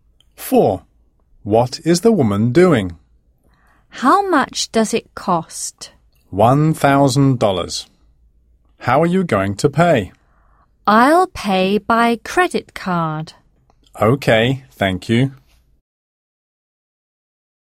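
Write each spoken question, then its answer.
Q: What is the woman doing?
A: paying by credit card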